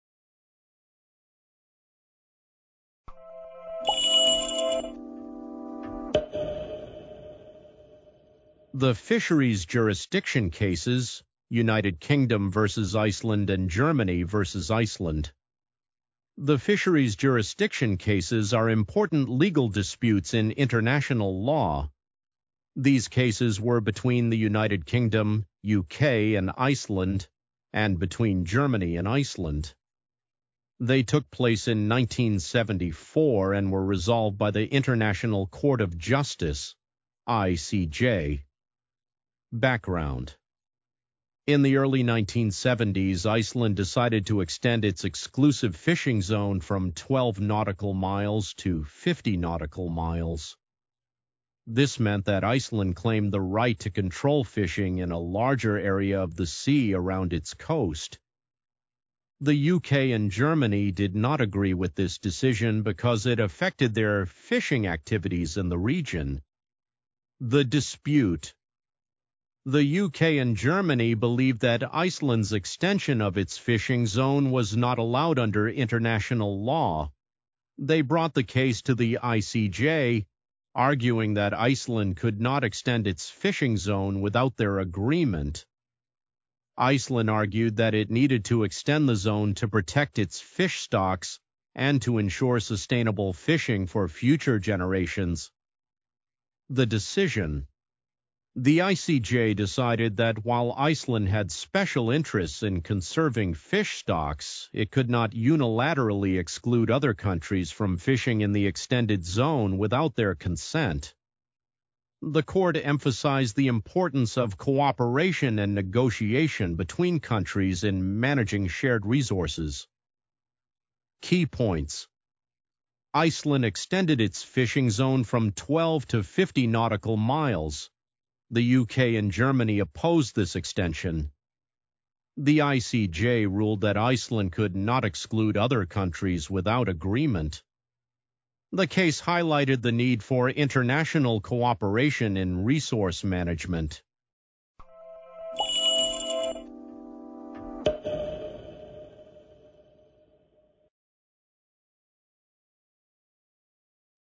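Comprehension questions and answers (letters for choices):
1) When did the Fisheries Jurisdiction Cases take place?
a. 1969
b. 1974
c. 1986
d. 2001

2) Which countries were involved in the dispute against Iceland?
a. United States and Canada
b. France and Spain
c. United Kingdom and Germany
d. Norway and Denmark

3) What did Iceland do that caused the dispute?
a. Built a new fishing port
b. Extended its fishing zone from 12 to 50 nautical miles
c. Banned all fishing activities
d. Allowed only Icelandic ships to fish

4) Why did the UK and Germany oppose Iceland's decision?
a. It violated their shipping routes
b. It affected their fishing activities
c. It increased their taxes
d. It restricted their access to Iceland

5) What did the ICJ emphasize in its ruling?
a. The importance of competition in fishing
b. The need for countries to develop their own fishing laws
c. The importance of cooperation and negotiation in managing shared resources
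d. The right of Iceland to extend its fishing zone unilaterally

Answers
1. b
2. c
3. b
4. b
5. c

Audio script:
The Fisheries Jurisdiction Cases (United Kingdom v. Iceland and Germany v. Iceland)
The Fisheries Jurisdiction Cases are important legal disputes in international law. These cases were between the United Kingdom (UK) and Iceland, and between Germany and Iceland. They took place in 1974 and were resolved by the International Court of Justice (ICJ).
Background
In the early 1970s, Iceland decided to extend its exclusive fishing zone from 12 nautical miles to 50 nautical miles. This meant that Iceland claimed the right to control fishing in a larger area of the sea around its coast. The UK and Germany did not agree with this decision because it affected their fishing activities in the region.
The Dispute
The UK and Germany believed that Iceland's extension of its fishing zone was not allowed under international law. 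They brought the case to the ICJ, arguing that Iceland could not extend its fishing zone without their agreement. Iceland argued that it needed to extend the zone to protect its fish stocks and to ensure sustainable fishing for future generations.
The Decision
The ICJ decided that while Iceland had special interests in conserving fish stocks, it could not unilaterally exclude other countries from fishing in the extended zone without their consent. The court emphasized the importance of cooperation and negotiation between countries in managing shared resources.
Key Points
The UK and Germany opposed this extension.
The ICJ ruled that Iceland could not exclude other countries without agreement.
The case highlighted the need for international cooperation in resource management.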